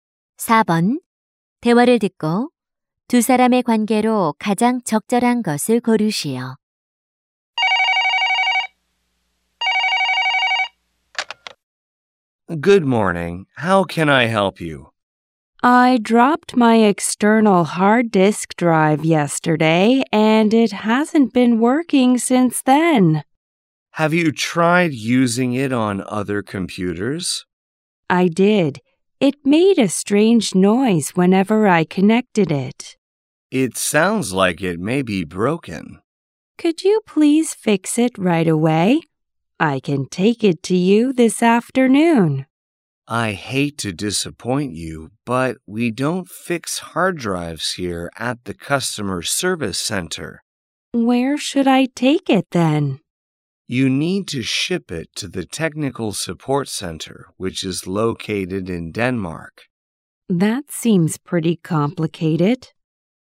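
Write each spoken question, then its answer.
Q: 대화를 듣고 두 사람의 관계로 가장 적절한 것을 고르시오.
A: 고객 서비스 센터 직원과 고객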